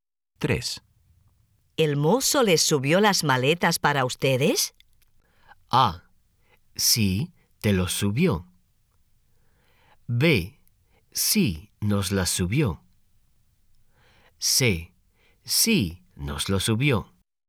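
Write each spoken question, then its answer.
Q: ¿El mozo les subió las maletas para ustedes?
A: B: Sí, nos las subió.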